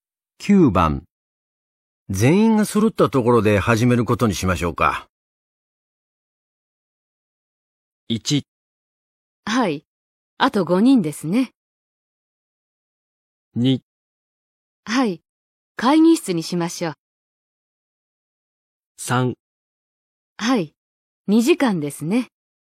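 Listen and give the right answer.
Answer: 1: はい、あと5人ですね。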